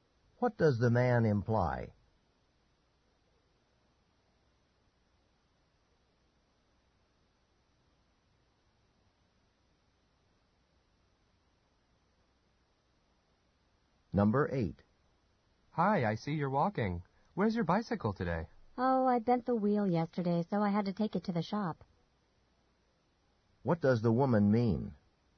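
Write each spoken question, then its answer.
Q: What does the woman mean?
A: Her bicycle is being repaired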